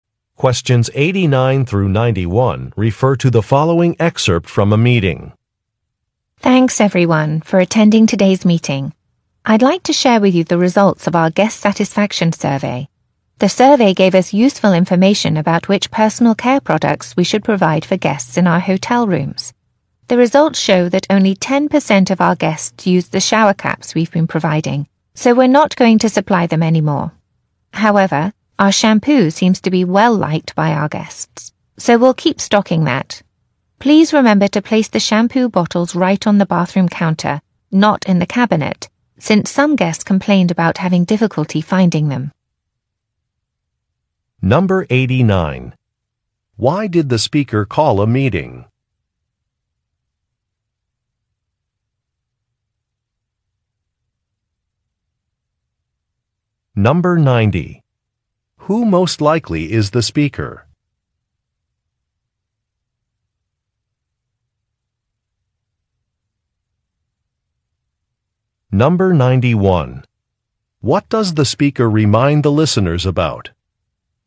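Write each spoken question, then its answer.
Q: Why did the speaker call a meeting?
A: To share the results of a guest satisfaction survey

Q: What does the speaker remind the listeners about?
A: To put the shampoo bottles on the bathroom counter, not in the cabinet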